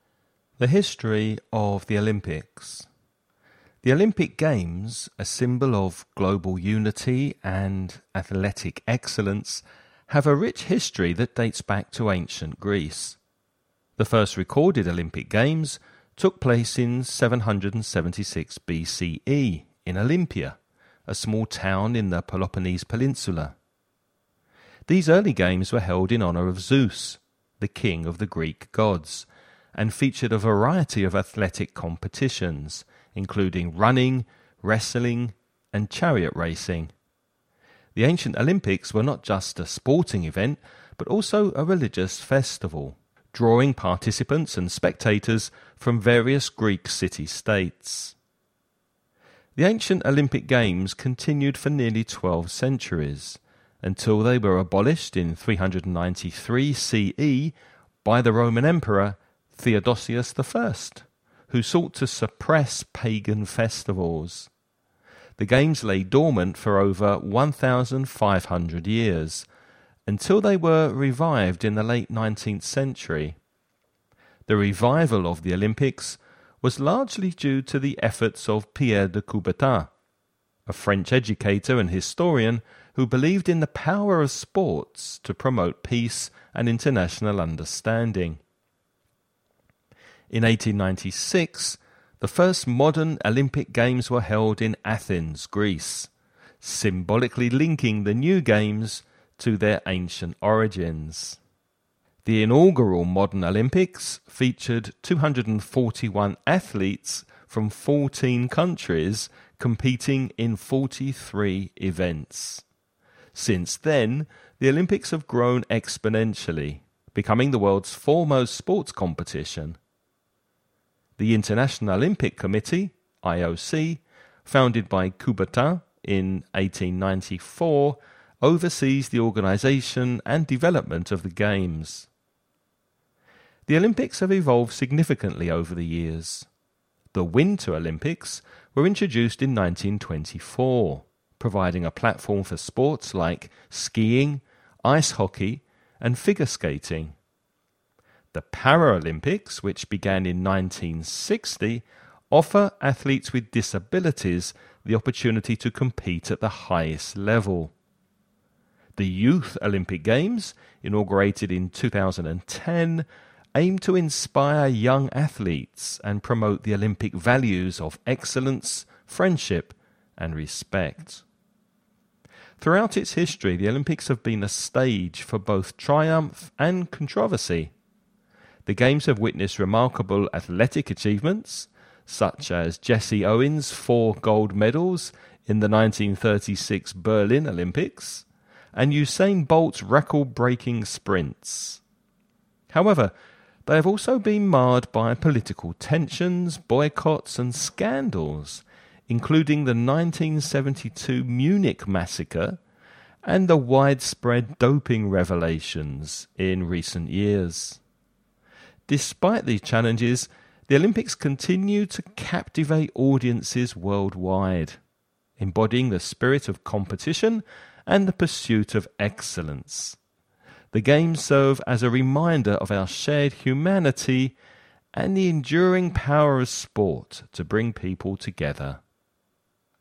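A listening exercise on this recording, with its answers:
You're going to listen to a man talking about the history of the Olympics. Before you listen, read the following questions.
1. Where and when did the first recorded Olympic Games take place?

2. Who was the ancient Olympic Games held in honour of?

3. Why were the ancient Olympic Games abolished, and by whom?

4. Who played a significant role in reviving the modern Olympic Games?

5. What year were the first modern Olympic Games held, and where?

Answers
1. In Olympia, in 776 BCE
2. Zeus
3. To suppress pagan festivals, by Roman Emperor Theodosius I (393 CE)
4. Pierre de Coubertin
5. In 1896, in Athens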